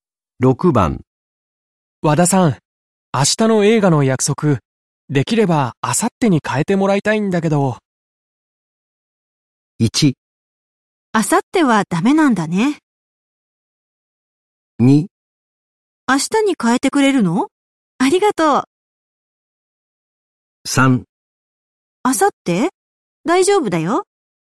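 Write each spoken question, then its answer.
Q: 和田さん、明日の映画の約束、できれば明後日に変えてもらいたいんだけど。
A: 3: 明後日?大丈夫だよ。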